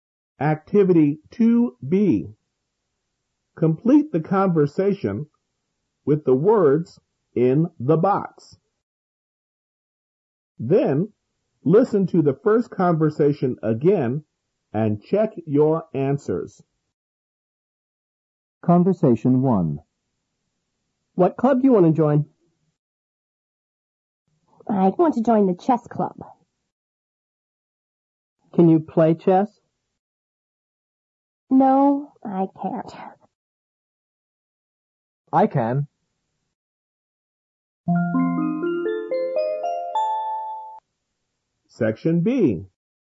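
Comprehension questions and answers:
2b Complete the conversation with the words in the box.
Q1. David:What club( )you want ( )join?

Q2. Lisa:We( )to join the chess( ).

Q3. David:Can you ( )chess?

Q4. Lisa:No,I ( ).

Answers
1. do; to
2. want; club
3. play
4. can't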